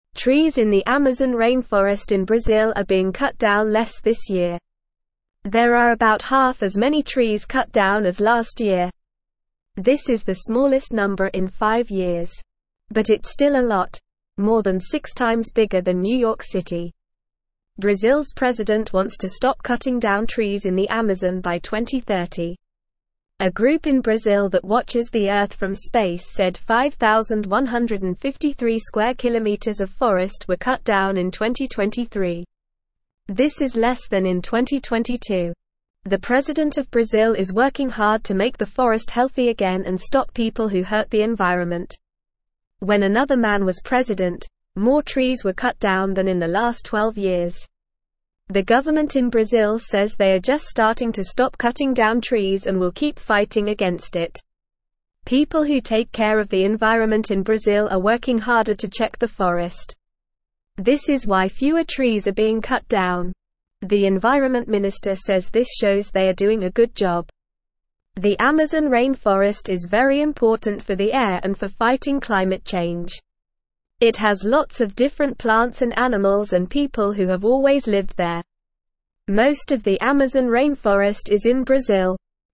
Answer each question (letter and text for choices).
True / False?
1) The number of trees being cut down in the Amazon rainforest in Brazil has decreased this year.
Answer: True

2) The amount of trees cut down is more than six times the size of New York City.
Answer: True

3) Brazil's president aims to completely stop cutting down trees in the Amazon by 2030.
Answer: True

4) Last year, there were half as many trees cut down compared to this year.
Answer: False

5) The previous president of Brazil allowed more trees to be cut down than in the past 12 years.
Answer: True

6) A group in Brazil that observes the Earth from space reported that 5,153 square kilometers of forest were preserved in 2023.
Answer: False

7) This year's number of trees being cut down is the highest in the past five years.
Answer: False

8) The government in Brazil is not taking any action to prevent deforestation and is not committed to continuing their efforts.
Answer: False

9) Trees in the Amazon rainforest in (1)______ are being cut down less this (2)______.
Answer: Brazil

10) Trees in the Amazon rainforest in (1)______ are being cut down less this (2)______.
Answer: year

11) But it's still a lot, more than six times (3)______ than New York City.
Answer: bigger

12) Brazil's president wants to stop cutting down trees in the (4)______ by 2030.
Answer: Amazon

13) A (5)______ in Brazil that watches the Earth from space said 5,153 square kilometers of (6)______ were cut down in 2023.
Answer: group

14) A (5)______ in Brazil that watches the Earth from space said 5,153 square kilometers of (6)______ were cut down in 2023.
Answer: forest

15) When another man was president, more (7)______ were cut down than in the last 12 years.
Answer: trees

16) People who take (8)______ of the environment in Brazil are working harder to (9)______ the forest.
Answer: care

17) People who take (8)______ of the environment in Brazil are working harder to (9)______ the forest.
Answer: check

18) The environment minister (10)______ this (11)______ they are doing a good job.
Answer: says

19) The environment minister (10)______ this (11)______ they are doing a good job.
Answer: shows

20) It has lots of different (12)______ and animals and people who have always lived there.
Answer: plants

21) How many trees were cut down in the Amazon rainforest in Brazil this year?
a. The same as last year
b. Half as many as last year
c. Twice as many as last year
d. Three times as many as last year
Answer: b. Half as many as last year

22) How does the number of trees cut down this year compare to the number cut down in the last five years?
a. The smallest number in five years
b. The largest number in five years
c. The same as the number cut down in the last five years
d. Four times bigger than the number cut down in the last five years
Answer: a. The smallest number in five years

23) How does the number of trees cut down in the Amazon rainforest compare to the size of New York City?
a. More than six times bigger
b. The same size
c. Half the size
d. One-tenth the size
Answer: a. More than six times bigger

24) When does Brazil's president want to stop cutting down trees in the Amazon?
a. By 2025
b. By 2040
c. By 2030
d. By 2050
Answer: c. By 2030

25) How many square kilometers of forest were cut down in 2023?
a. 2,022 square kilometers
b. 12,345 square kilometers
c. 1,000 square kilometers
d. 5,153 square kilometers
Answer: d. 5,153 square kilometers

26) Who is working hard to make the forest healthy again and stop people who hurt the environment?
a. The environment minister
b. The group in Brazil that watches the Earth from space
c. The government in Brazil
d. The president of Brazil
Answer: d. The president of Brazil

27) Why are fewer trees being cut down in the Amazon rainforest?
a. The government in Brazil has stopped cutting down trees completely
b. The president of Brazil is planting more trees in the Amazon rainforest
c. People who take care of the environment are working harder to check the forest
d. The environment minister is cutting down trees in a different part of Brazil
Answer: c. People who take care of the environment are working harder to check the forest

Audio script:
Trees in the Amazon rainforest in Brazil are being cut down less this year. There are about half as many trees cut down as last year. This is the smallest number in five years. But it's still a lot, more than six times bigger than New York City. Brazil's president wants to stop cutting down trees in the Amazon by 2030.
A group in Brazil that watches the Earth from space said 5,153 square kilometers of forest were cut down in 2023. This is less than in 2022. The president of Brazil is working hard to make the forest healthy again and stop people who hurt the environment. When another man was president, more trees were cut down than in the last 12 years. The government in Brazil says they are just starting to stop cutting down trees and will keep fighting against it.
People who take care of the environment in Brazil are working harder to check the forest. This is why fewer trees are being cut down. The environment minister says this shows they are doing a good job. The Amazon rainforest is very important for the air and for fighting climate change. It has lots of different plants and animals and people who have always lived there. Most of the Amazon rainforest is in Brazil.

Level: Level 2